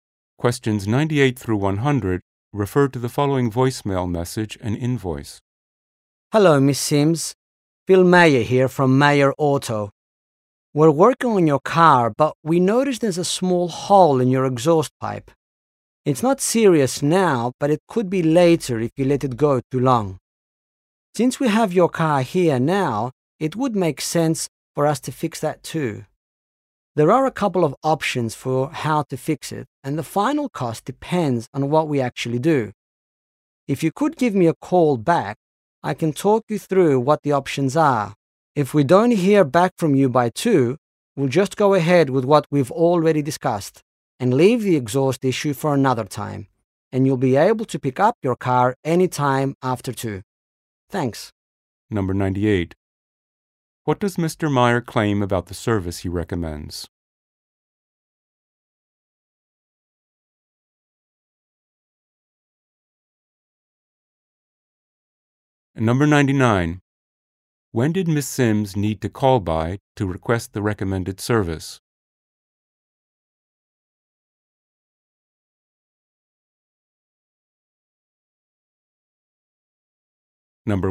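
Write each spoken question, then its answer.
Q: What does Mr. Mayer claim about the service he recommends?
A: It could prevent a more serious problem later

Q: When did Ms. Sims need to call by to request the recommended service?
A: By 2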